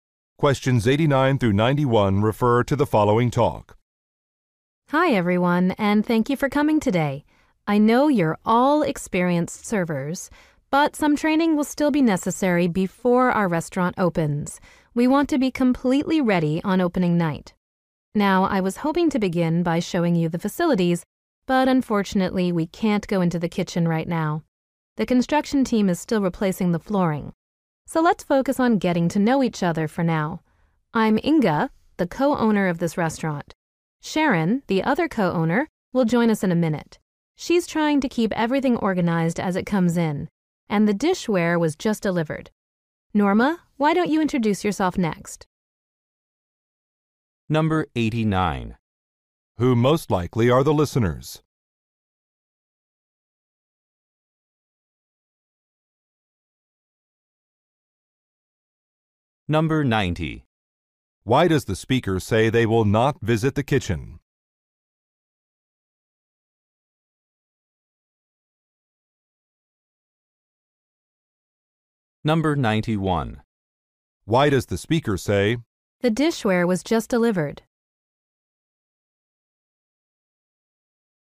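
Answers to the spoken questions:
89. Restaurant servers
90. The flooring is being replaced
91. To explain why Sharon is delayed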